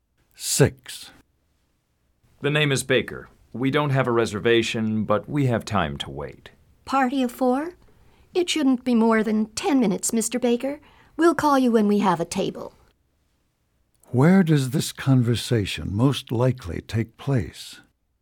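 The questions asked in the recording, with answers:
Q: Where does this conversation most likely take place?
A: In a restaurant.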